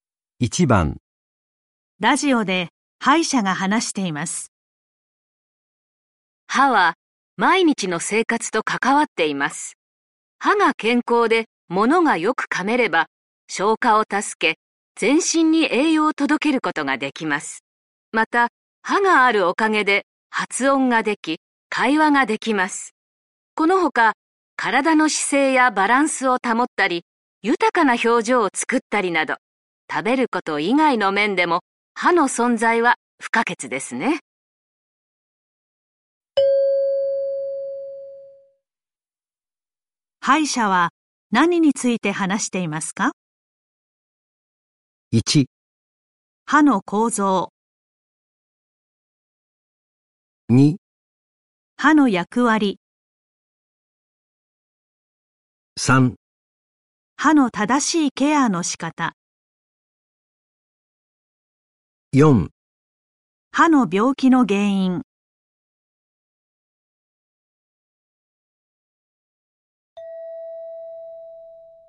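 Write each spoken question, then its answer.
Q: 歯医者は何について話していますか?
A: 2: 歯の役割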